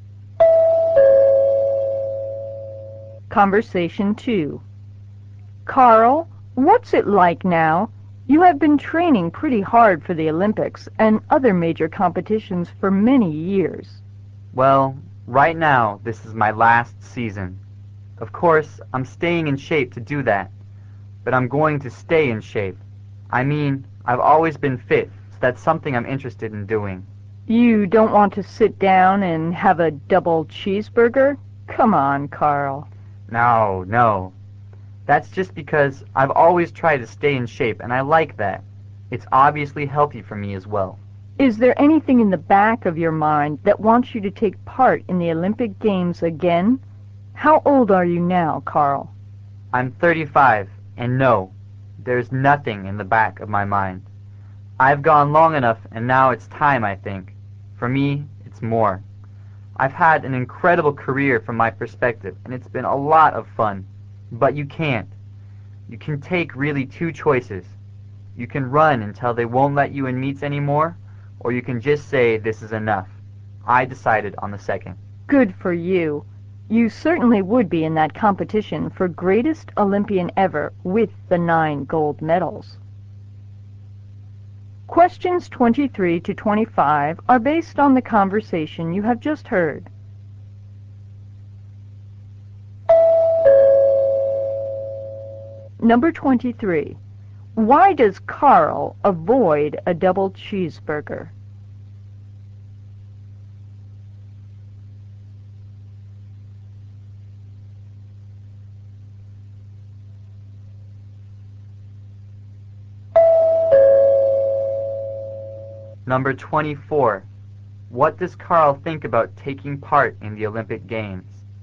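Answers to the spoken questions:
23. He wants to stay in shape
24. He has had enough and doesn't want to compete again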